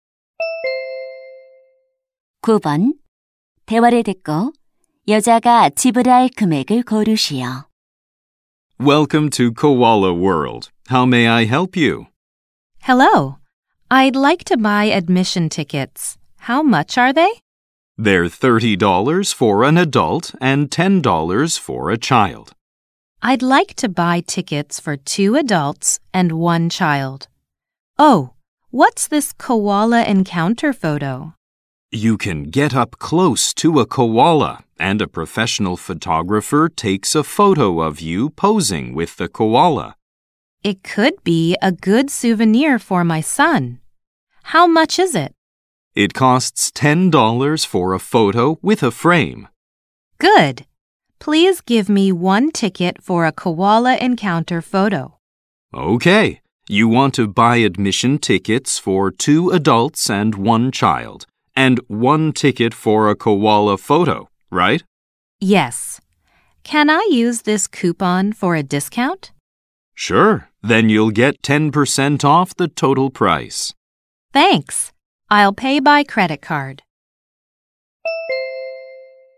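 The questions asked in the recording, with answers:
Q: 대화를 듣고 여자가 지불할 금액을 고르시오.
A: $72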